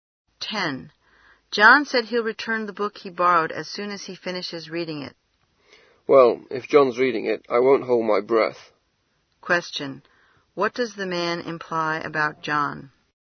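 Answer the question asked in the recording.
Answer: John reads slowly, so the book won't be returned soon.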